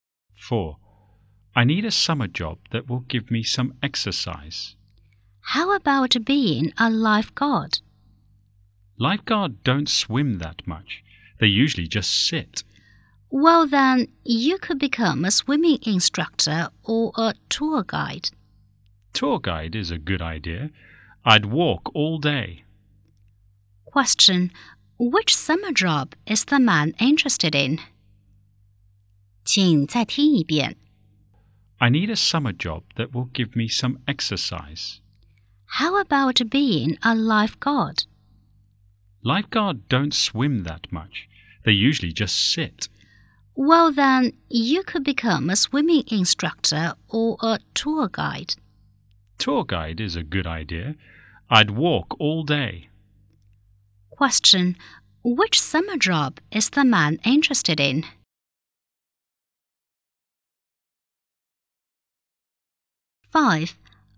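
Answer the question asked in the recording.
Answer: Tour guide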